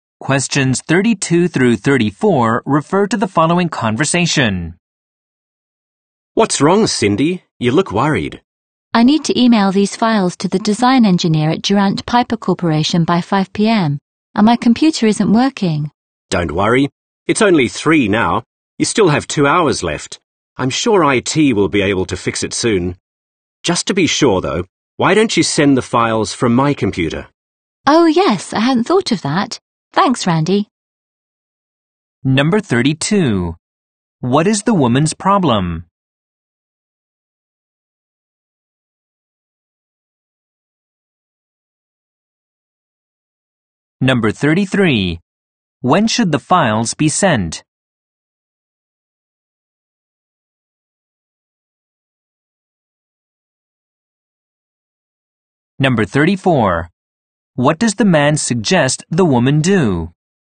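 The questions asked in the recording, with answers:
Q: What is the woman's problem?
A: Her computer isn't working.

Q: When should the files be sent?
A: By 5 p.m.

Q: What does the man suggest the woman do?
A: Send the files from his computer.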